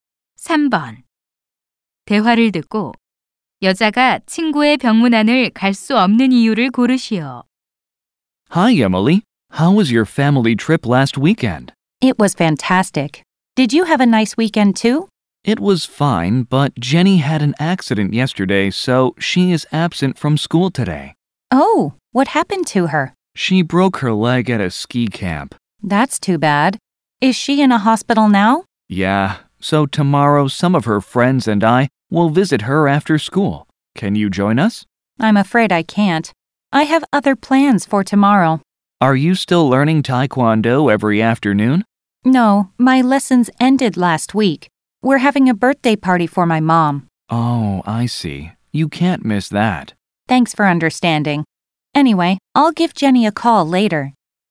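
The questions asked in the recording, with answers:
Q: 대화를 듣고 여자가 친구의 병문안을 갈 수 없는 이유를 고르시오.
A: 엄마의 생일 파티가 있어서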